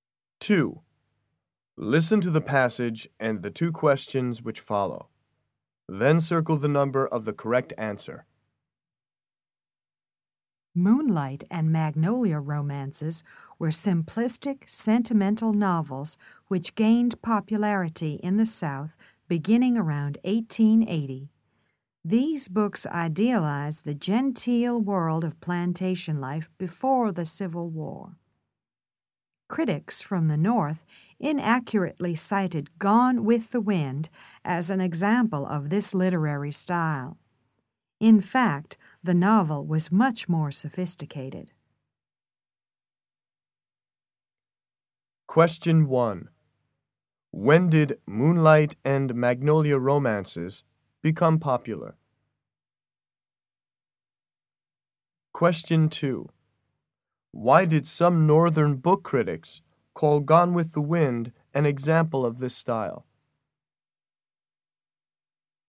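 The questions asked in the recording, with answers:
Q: When did Moonlight and Magnolia romances become popular?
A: Around 1880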